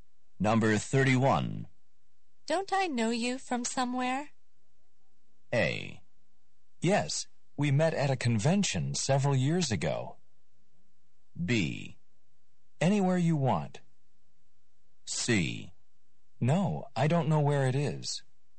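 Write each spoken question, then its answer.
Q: Don't I know you from somewhere?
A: A: Yes, we met at a convention several years ago.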